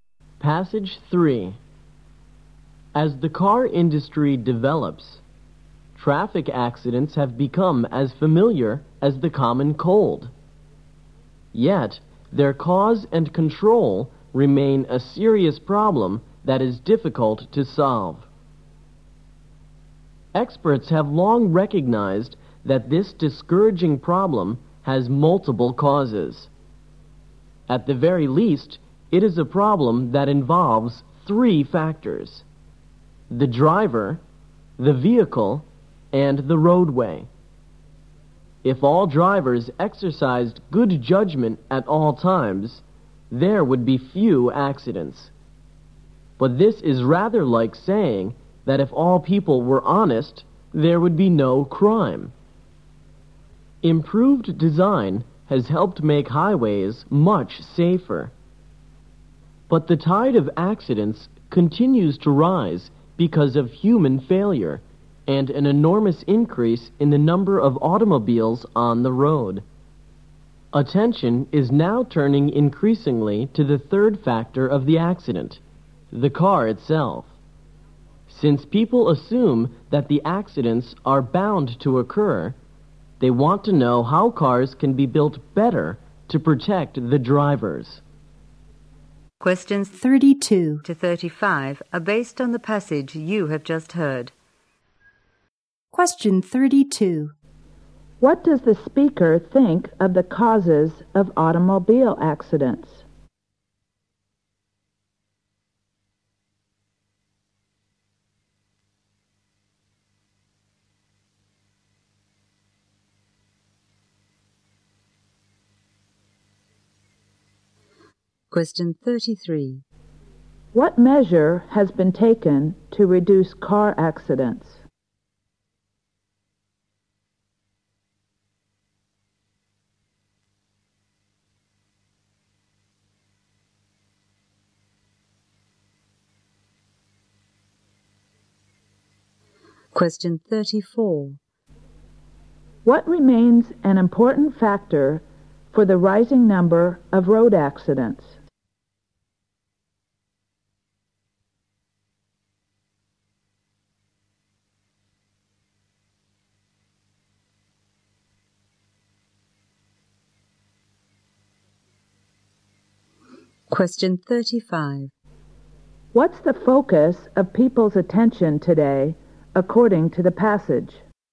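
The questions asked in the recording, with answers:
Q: What does the speaker think of the causes of automobile accidents?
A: They are multiple (driver, vehicle, roadway)

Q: What measure has been taken to reduce car accidents?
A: Improved highway design

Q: What remains an important factor for the rising number of road accidents?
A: Human failure (and more cars on the road)

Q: What's the focus of people's attention today, according to the passage?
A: Building cars that better protect drivers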